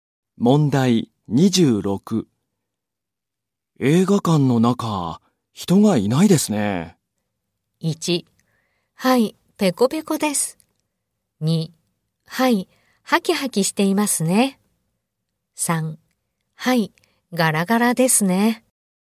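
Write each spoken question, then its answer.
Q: 映画館の中、人がいないですね。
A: 3: はい、ガラガラですね。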